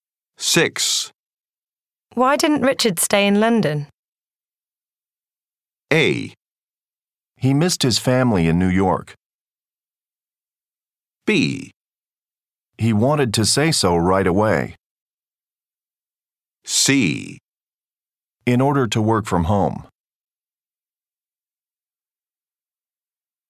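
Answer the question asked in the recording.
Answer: A: He missed his family in New York.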